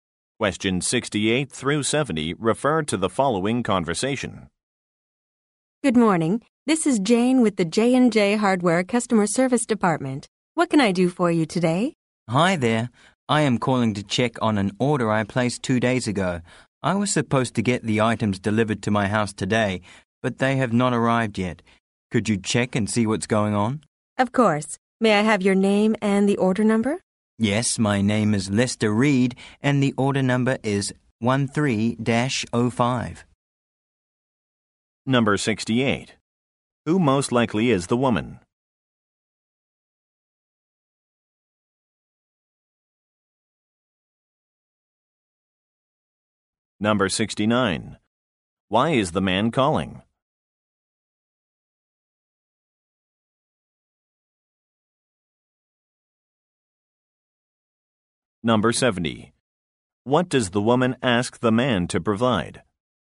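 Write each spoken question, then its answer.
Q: Who most likely is the woman?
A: A customer service representative

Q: Why is the man calling?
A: To check on an order that hasn't arrived

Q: What does the woman ask the man to provide?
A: His name and order number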